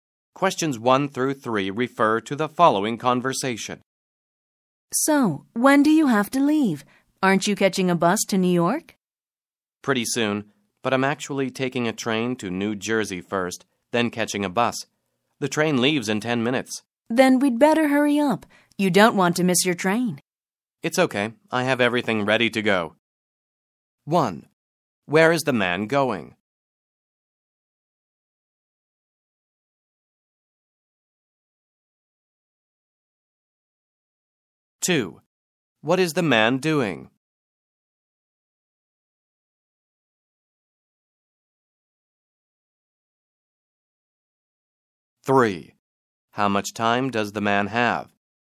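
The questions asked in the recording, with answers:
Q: Where is the man going?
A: To New York (by train to New Jersey first, then by bus)

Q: How much time does the man have?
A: 10 minutes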